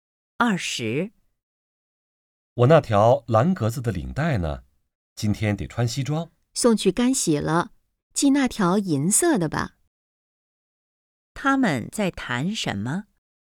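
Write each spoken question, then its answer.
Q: 他们在谈什么?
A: 领带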